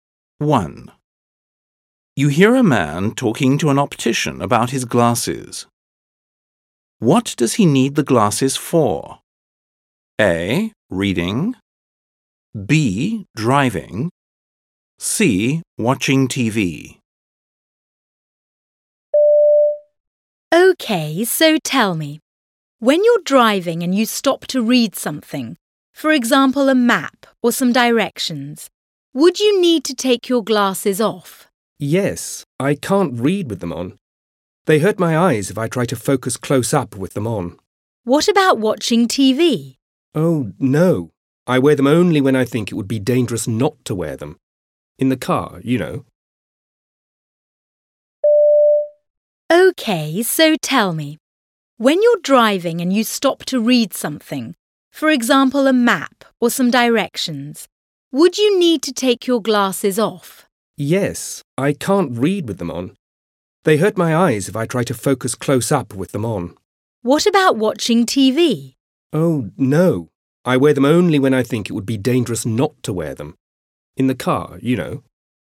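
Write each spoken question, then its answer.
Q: What does he need the glasses for?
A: B: Driving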